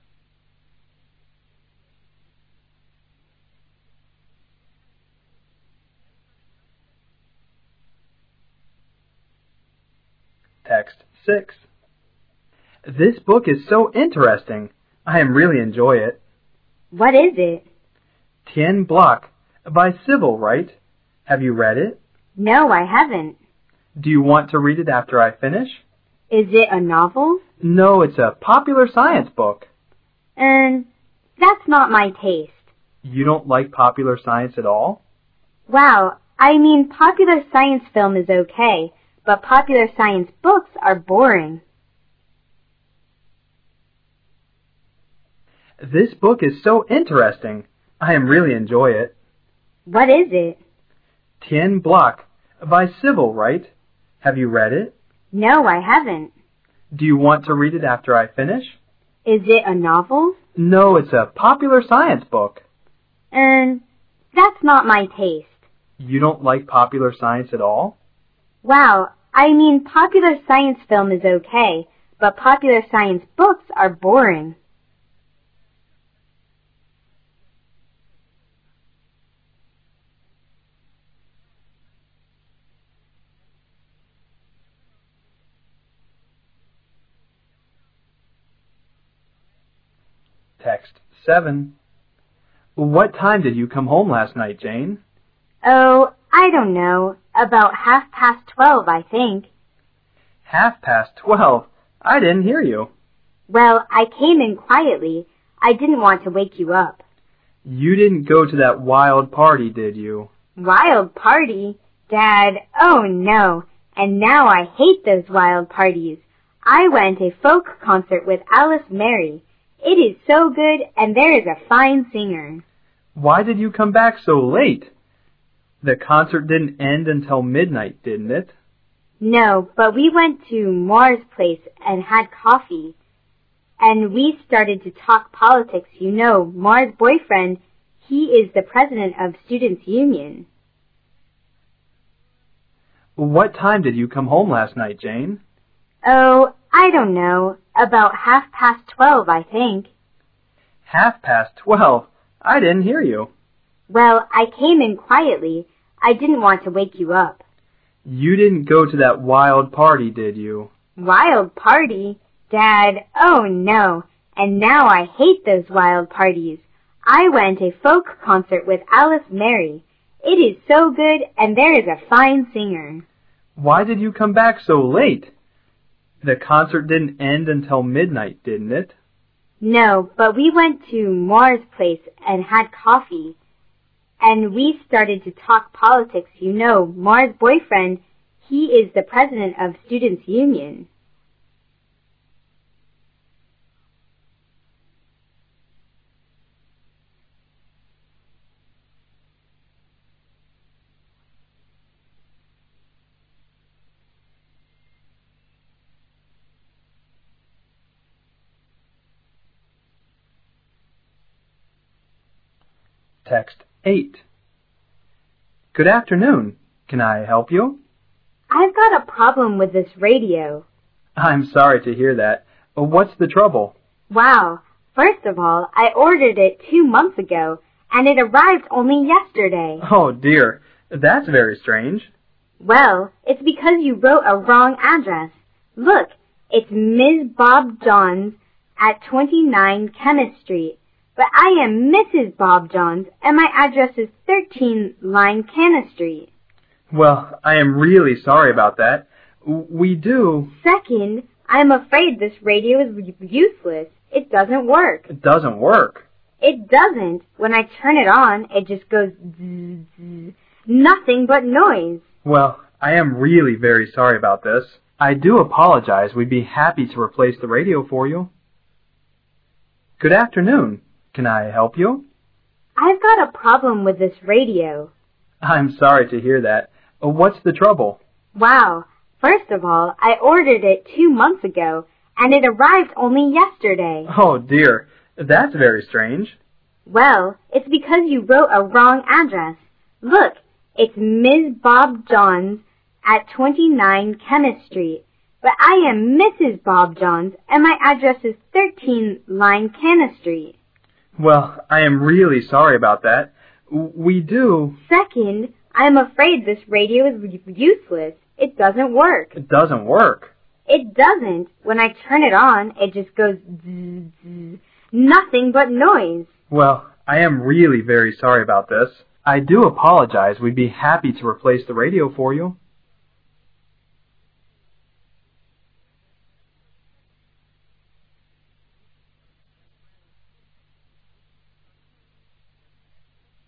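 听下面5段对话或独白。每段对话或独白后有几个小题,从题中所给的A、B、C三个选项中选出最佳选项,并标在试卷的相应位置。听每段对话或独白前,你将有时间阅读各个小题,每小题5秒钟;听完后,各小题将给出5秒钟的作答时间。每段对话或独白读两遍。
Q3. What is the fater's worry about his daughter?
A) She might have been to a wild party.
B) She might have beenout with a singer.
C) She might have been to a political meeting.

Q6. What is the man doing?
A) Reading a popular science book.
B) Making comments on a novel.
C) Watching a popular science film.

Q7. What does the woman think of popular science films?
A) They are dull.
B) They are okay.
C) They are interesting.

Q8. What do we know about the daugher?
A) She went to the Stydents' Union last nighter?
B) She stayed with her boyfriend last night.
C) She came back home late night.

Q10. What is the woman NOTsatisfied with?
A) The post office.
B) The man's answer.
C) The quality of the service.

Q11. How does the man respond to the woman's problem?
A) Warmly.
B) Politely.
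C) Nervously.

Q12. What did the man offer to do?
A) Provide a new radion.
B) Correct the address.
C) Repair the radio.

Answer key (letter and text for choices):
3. A) She might have been to a wild party.
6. A) Reading a popular science book.
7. B) They are okay.
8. C) She came back home late night.
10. C) The quality of the service.
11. B) Politely.
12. A) Provide a new radion.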